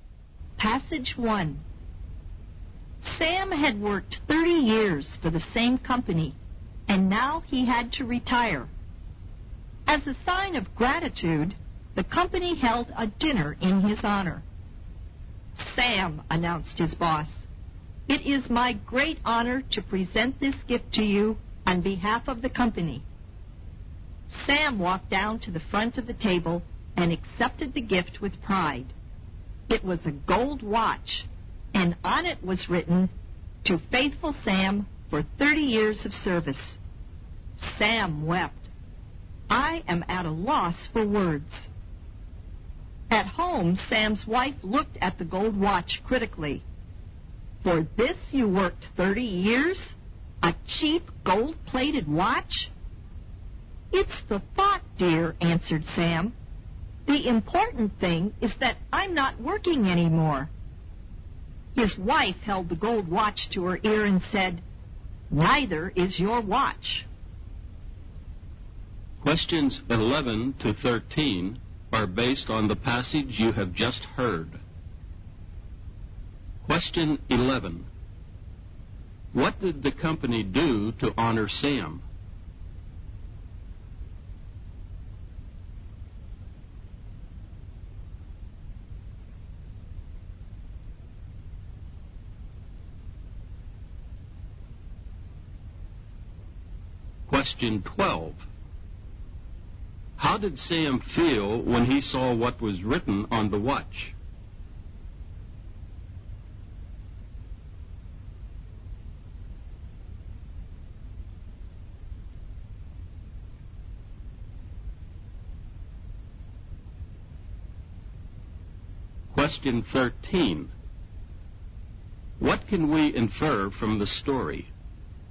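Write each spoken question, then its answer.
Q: What did the company do to honor Sam?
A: Held a dinner in his honor and gave him a gold watch

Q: How did Sam feel when he saw what was written on the watch?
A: Moved; he wept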